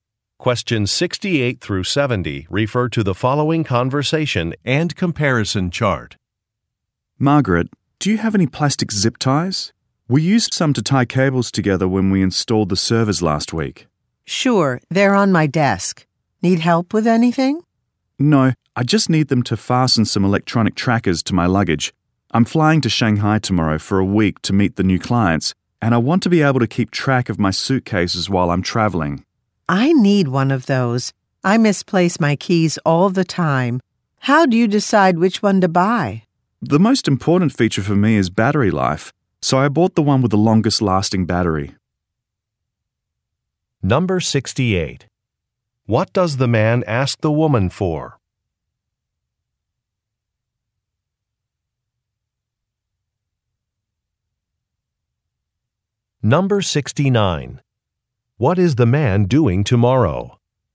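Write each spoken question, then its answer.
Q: What does the man ask the woman for?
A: Plastic zip ties

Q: What is the man doing tomorrow?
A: Flying to Shanghai to meet new clients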